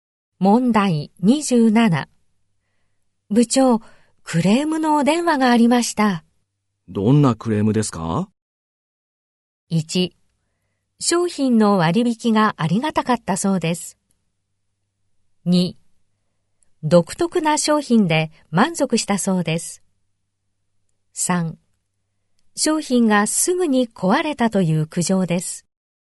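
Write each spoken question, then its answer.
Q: 部長、クレームのお電話がありました。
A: 3: 商品がすぐに壊れたという苦情です。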